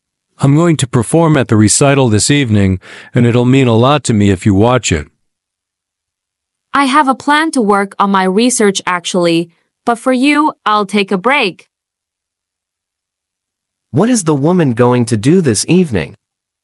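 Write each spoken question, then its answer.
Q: What is the woman going to do this evening?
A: Take a break from her research and watch the man's recital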